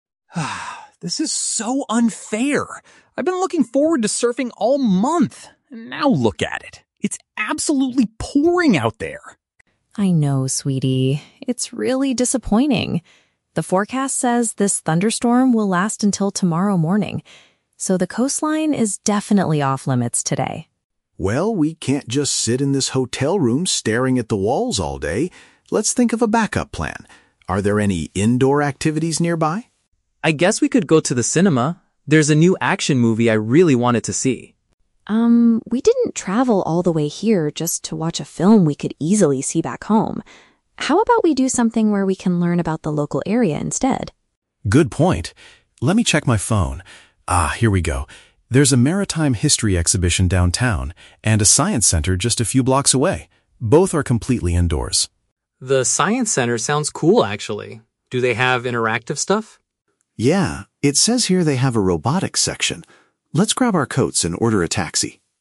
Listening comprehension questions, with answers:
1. Why is the family unable to do their original activity?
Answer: Heavy rain makes it impossible to visit the beach.

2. Why does the mother reject the boy's suggestion?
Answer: She wants to do an activity that is unique to their holiday destination.

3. What are they going to do next?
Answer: Take a cab to visit an educational indoor attraction.

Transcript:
Leo: This is so unfair. I've been looking forward to surfing all month, and now look at it. It's absolutely pouring out there!
Mom: I know, sweetie, it's really disappointing. The forecast says this thunderstorm will last until tomorrow morning. So, the coastline is definitely off-limits today.
Dad: Well, we can't just sit in this hotel room staring at the walls all day. Let's think of a backup plan. Are there any indoor activities nearby?
Leo: I guess we could go to the cinema? There's a new action movie I really wanted to see.
Mom: Um, we didn't travel all the way here just to watch a film we could easily see back home. How about we do something where we can learn about the local area instead?
Dad: Good point. Let me check my phone... Ah, here we go. There's a maritime history exhibition downtown, and a science center just a few blocks away. Both are completely indoors.
Leo: The science center sounds cool, actually. Do they have interactive stuff?
Dad: Yeah, it says here they have a robotics section. Let's grab our coats and order a taxi.